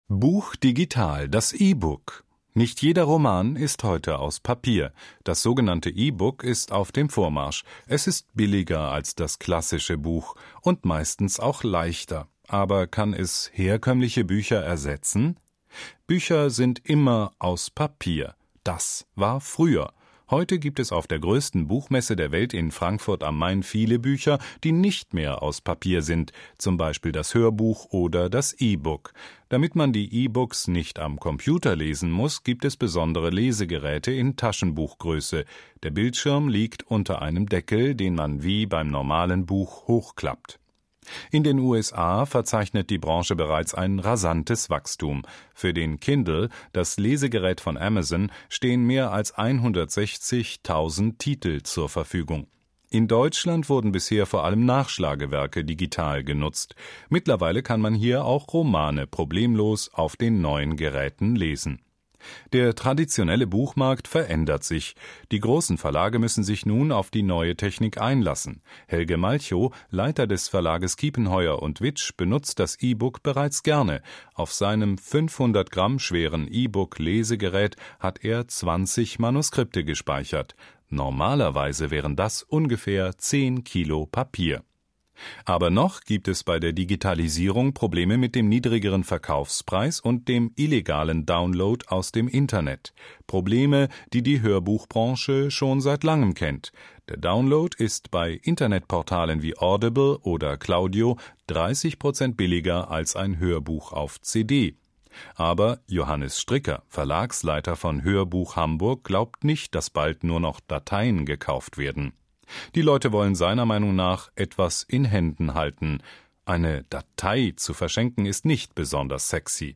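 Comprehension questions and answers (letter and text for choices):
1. In den USA ...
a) benutzen bereits 160.000 Menschen das Lesegerät von Amazon.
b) gibt es allein für das Lesegerät von Amazon über 160.000 E-Books.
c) gibt es 160.000 verschiedene Lesegeräte für E-Books.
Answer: b) gibt es allein für das Lesegerät von Amazon über 160.000 E-Books.

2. Das E-Book ist ...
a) ein kleiner Bildschirm, den man in die Tasche stecken kann.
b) eine Datei, die man am Computer oder mit einem Lesegerät lesen kann.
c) eine Datei, die man auf dem MP3-Player anhören kann.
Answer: b) eine Datei, die man am Computer oder mit einem Lesegerät lesen kann.

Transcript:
Buch digital: Das E-Book
Bücher sind immer aus Papier. Das war früher! Heute gibt es auf der größten Buchmesse der Welt in Frankfurt am Main viele Bücher, die nicht mehr aus Papier sind: zum Beispiel das Hörbuch oder das E-Book. Damit man die E-Books nicht am Computer lesen muss, gibt es besondere Lesegeräte in Taschenbuch-Größe. 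Der Bildschirm liegt unter einem Deckel, den man wie beim normalen Buch hochklappt.
In den USA verzeichnet die Branche bereits ein rasantes Wachstum; Für den Kindle, das Lesegerät von Amazon, stehen mehr als 160.000 Titel zur Verfügung. In Deutschland wurden bisher vor allem Nachschlagewerke digital genutzt. Mittlerweile kann man hier auch Romane problemlos auf den neuen Geräten lesen.
Der traditionelle Buchmarkt verändert sich. Die großen Verlage müssen sich nun auf die neue Technik einlassen. Helge Malchow, Leiter des Verlages Kiepenheuer & Witsch, benutzt das E-Book bereits gerne: Auf seinem 500 Gramm schweren E-Book-Lesegerät hat er 20 Manuskripte gespeichert. Normalerweise wären das ungefähr 10 Kilo Papier.
Aber noch gibt es bei der Digitalisierung Probleme mit dem niedrigeren Verkaufspreis und dem illegalen Download aus dem Internet. Probleme, die die Hörbuchbranche schon seit Langem kennt: Der Download ist bei Internetportalen wie Audible oder Claudio 30 Prozent billiger als ein Hörbuch auf CD. 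Aber Johannes Stricker, Verlagsleiter von Hörbuch Hamburg, glaubt nicht, dass bald nur noch Dateien gekauft werden. Die Leute wollen seiner Meinung nach etwas in Händen halten: "Eine Datei zu verschenken ist nicht besonders sexy."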